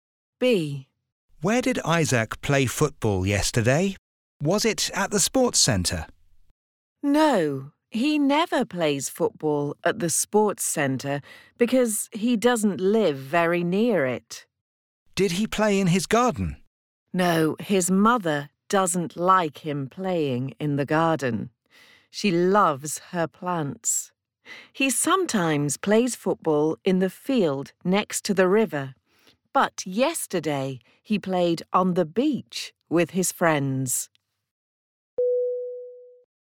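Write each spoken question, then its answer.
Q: Where did Isaac play football yesterday?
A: On the beach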